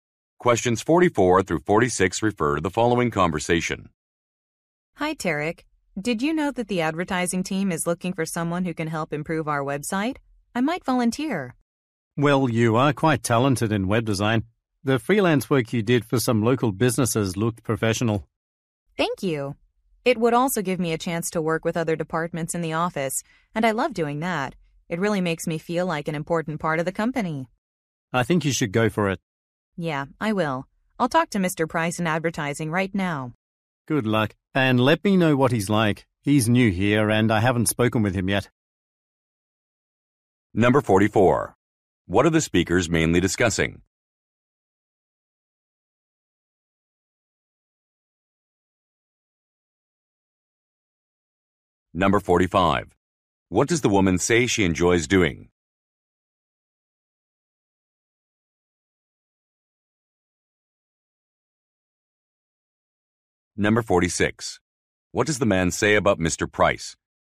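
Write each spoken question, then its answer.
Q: What are the speakers mainly discussing?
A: Volunteering to help improve the website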